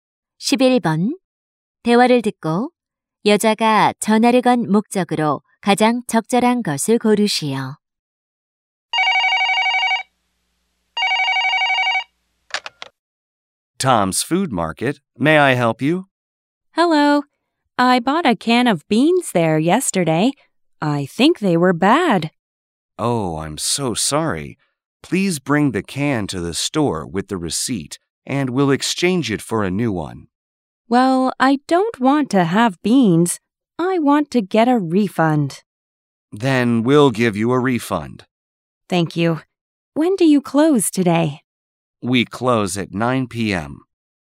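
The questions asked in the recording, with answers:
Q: 대화를 듣고 여자가 전화를 건 목적으로 가장 적절한 것을 고르시오.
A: 환불 받기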